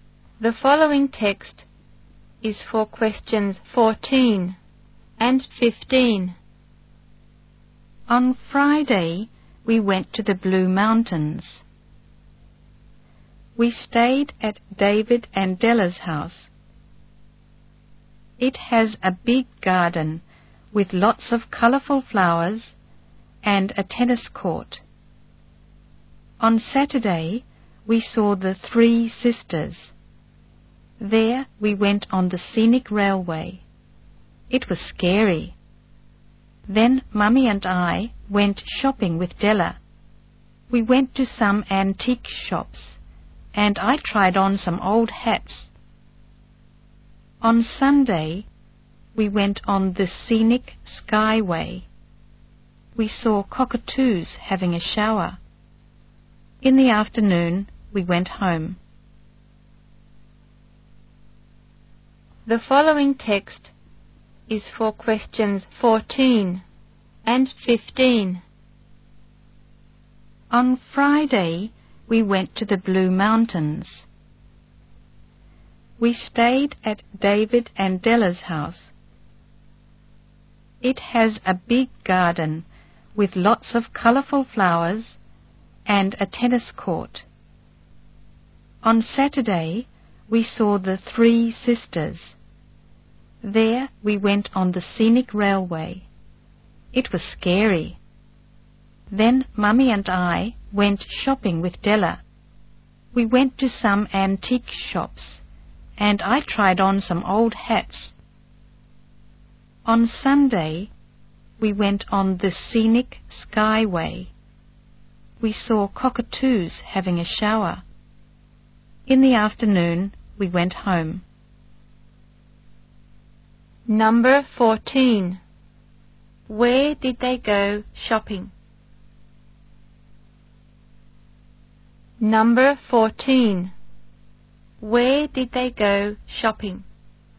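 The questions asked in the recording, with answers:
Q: Where did they go shopping?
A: At some antique shops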